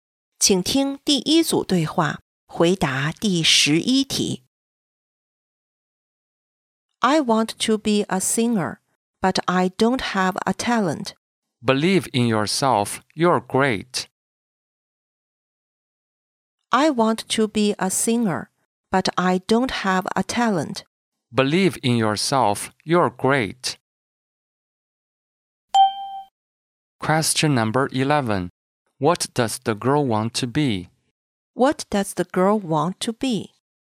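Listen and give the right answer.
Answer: A singer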